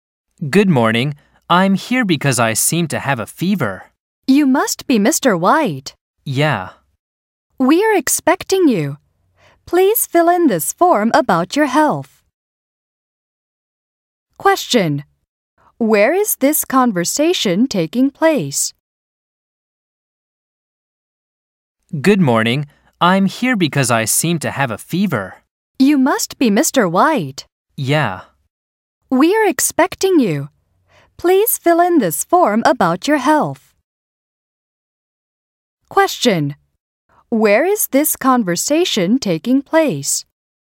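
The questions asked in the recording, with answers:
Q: Where is this conversation taking place?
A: At a hospital or clinic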